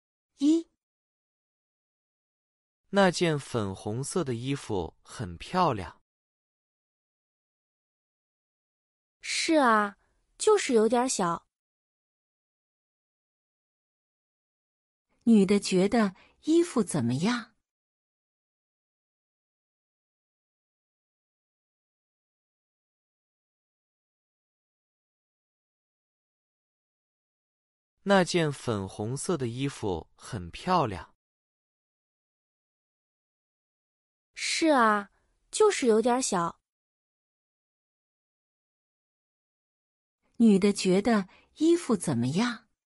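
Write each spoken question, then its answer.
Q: 女的觉得衣服怎么样?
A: 很漂亮,就是有点小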